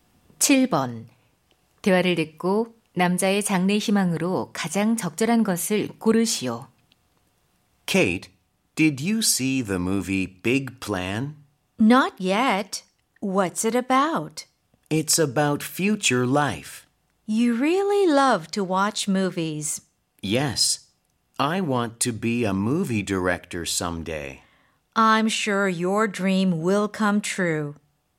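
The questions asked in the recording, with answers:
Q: 대화를 듣고 남자의 장래 희망으로 가장 적절한 것을 고르시오.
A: 영화감독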